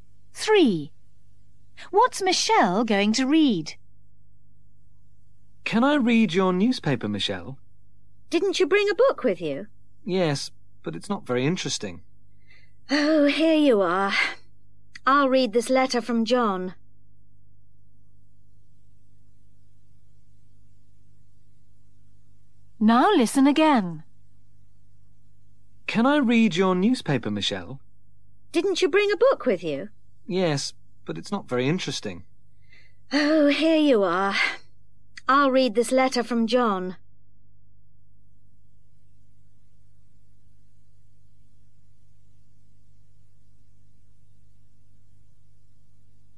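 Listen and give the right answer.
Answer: A letter from John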